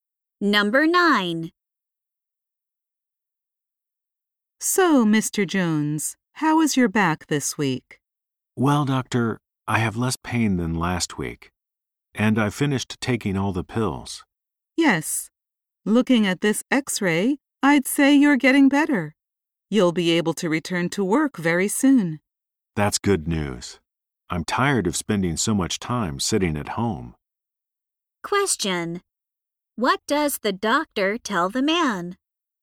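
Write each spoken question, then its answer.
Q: What does the doctor tell the man?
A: He will be able to return to work very soon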